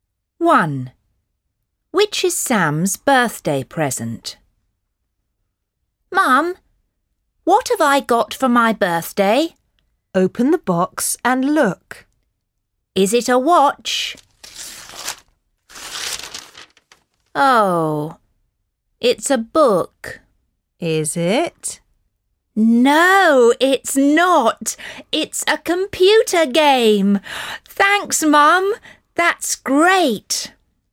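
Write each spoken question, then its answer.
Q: Which is Sam's birthday present?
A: a computer game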